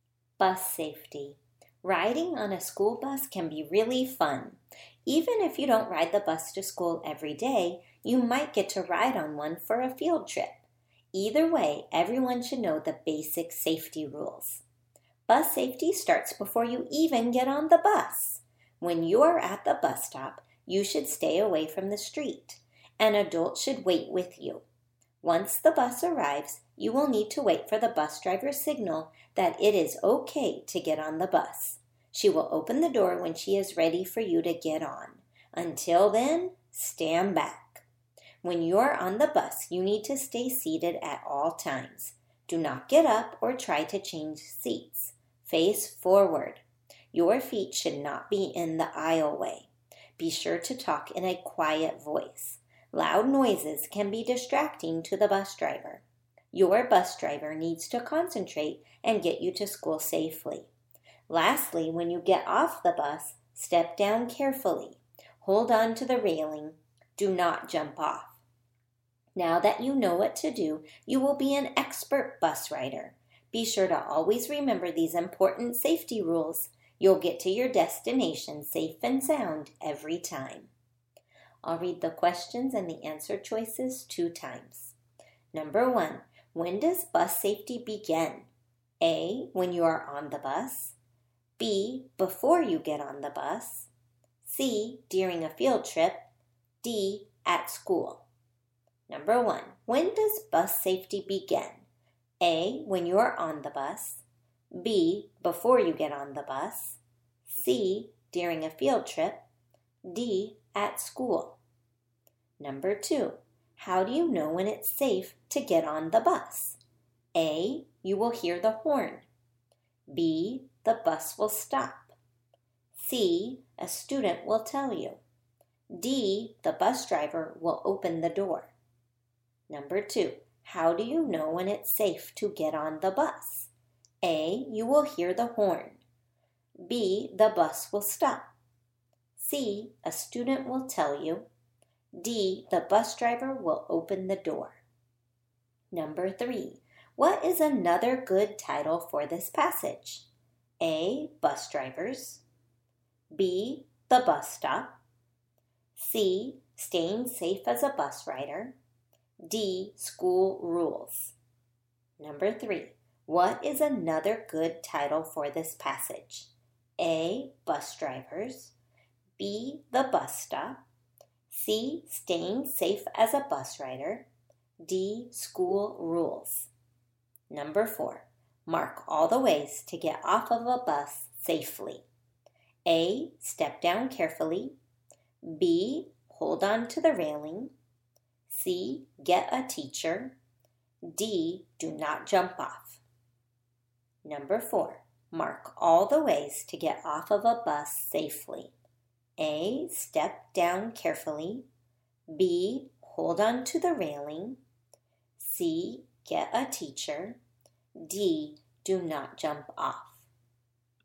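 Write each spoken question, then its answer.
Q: when does bus safety begin?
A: B: before you get on the bus

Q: how do you know when it's safe to get on the bus?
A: D: the bus driver will open the door

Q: what is another good title for this passage?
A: C: staying safe as a bus rider

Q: mark all the ways to get off of a bus safely.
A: A: step down carefully, B: hold on to the railing, D: do not jump off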